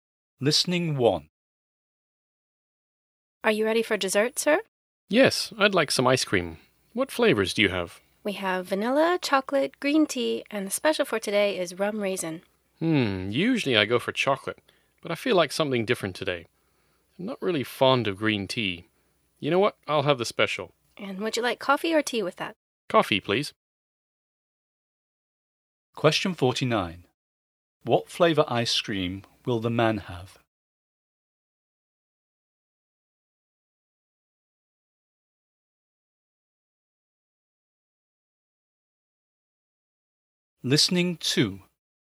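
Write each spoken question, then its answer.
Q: What flavor ice cream will the man have?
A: Rum raisin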